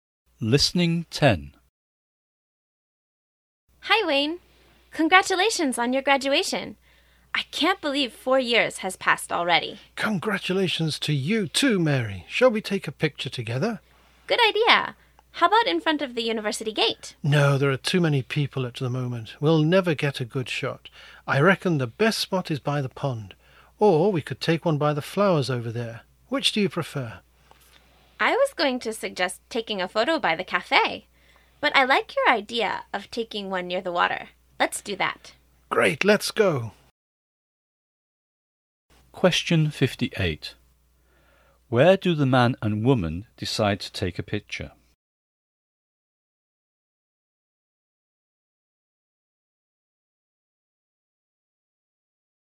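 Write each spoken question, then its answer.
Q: Where do the man and woman decide to take a picture?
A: By the pond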